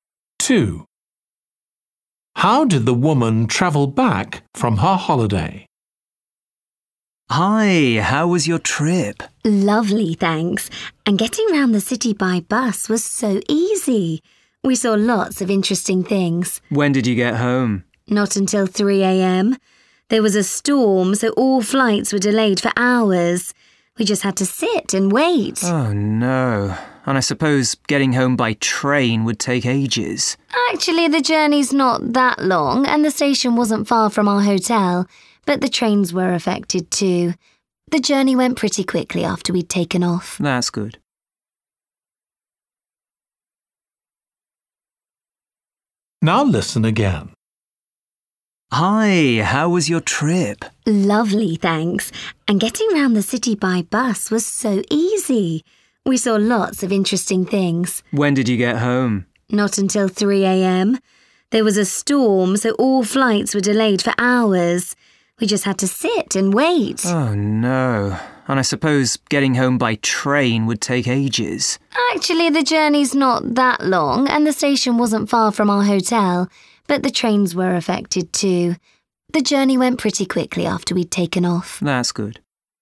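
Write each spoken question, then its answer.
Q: How did the woman travel back from her holiday?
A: By plane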